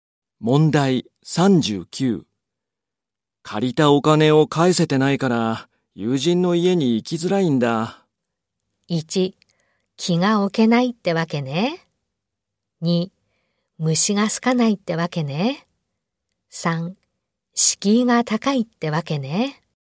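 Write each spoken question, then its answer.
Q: 借りたお金を返せてないから、友人の家に行きづらいんだ。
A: 3: 敷居が高いってわけね。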